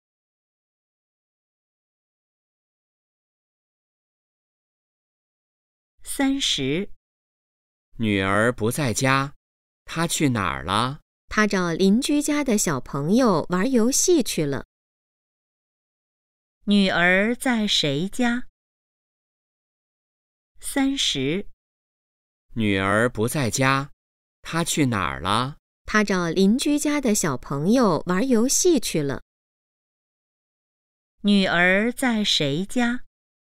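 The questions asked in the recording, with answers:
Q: 女儿在谁家?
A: 邻居家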